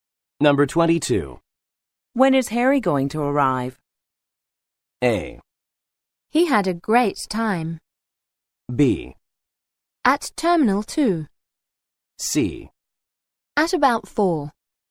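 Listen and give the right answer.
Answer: C: At about 4.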